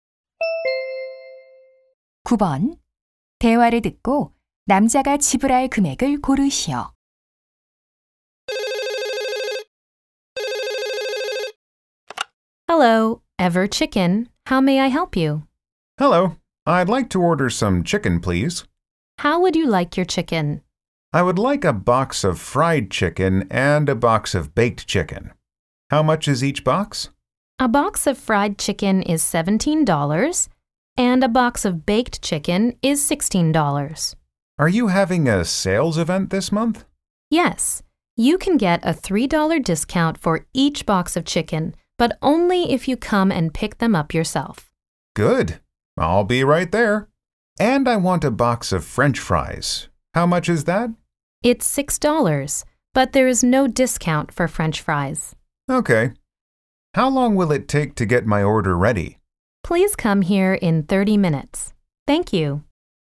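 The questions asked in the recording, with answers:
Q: 대화를 듣고 남자가 지불할 금액을 고르시오.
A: $33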